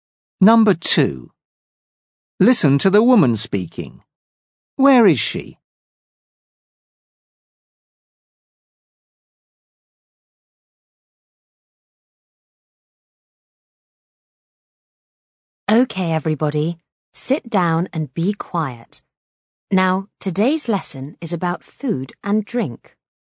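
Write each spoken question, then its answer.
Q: Where is she?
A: in a classroom at school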